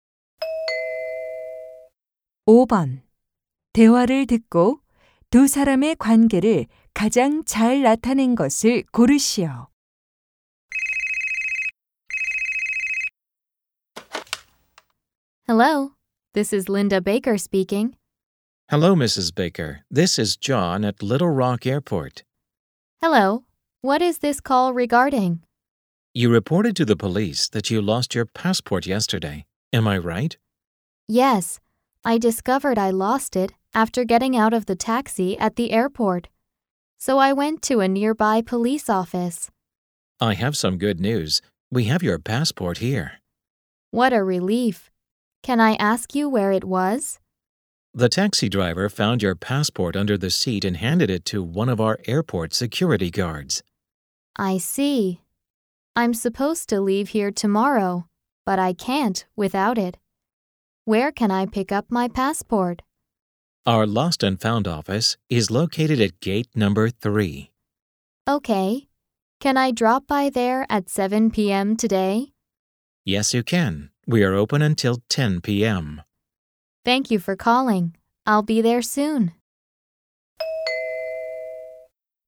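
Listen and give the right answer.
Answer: 분실물을 찾는 승객 - 공항 직원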